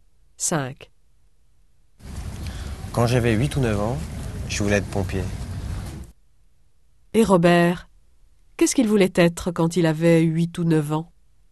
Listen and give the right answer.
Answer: Pompier.